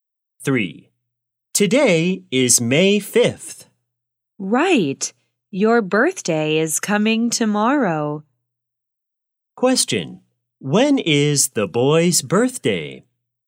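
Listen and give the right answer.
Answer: May 6th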